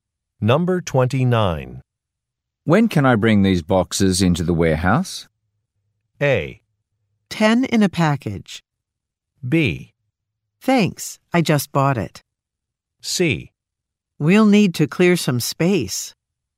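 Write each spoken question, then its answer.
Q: When can I bring these boxes into the warehouse?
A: C: We'll need to clear some space.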